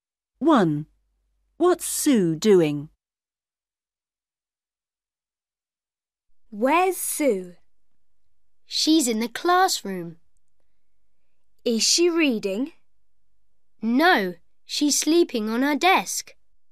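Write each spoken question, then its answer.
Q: What's Sue doing?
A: She's sleeping on her desk.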